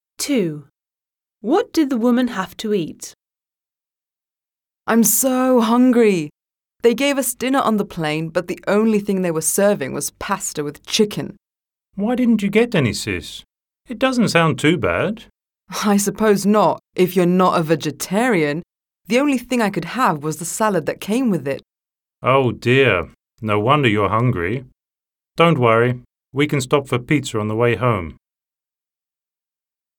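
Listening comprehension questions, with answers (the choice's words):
1. Listen to the recording. Choose the correct answer A, B or C. Mark your answers on your answer sheet. (Прослухайте сім окремих аудіозаписів та оберіть одну правильну відповідь AB або C до кожного діалогу або монологу )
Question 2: What did the woman have to eat?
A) pasta with chicken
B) salad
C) pizza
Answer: salad

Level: 9-Б клас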